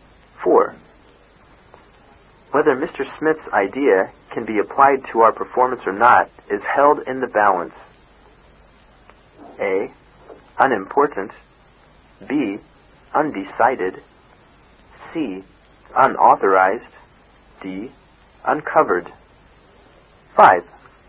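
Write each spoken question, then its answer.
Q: Whether Mr. Smith's idea can be applied to our performance or not is held in the balance.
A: B: Undecided.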